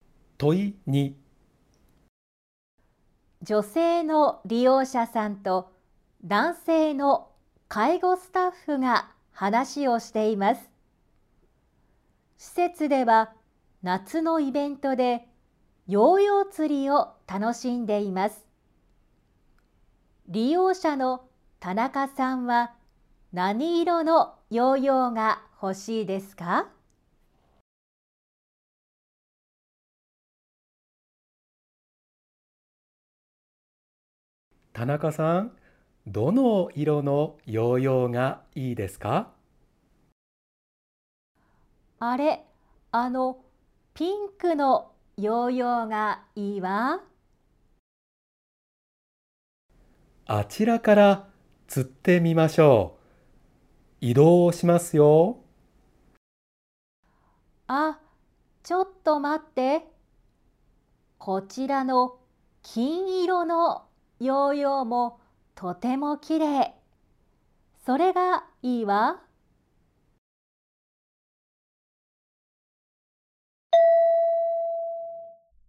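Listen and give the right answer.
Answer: 金色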